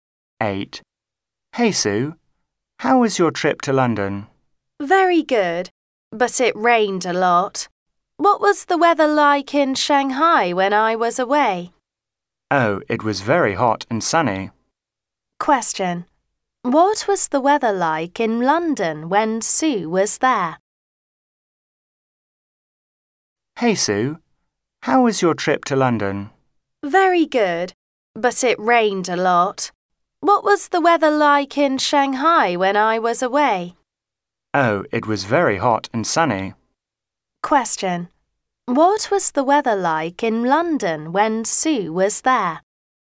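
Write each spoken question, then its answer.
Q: What was the weather like in London when Sue was there?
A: Rainy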